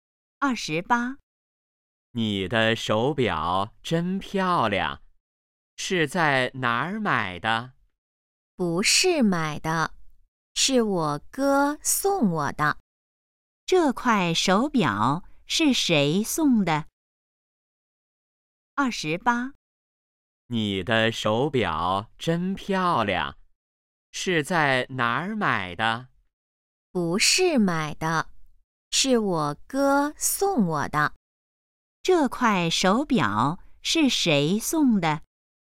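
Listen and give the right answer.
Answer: 哥哥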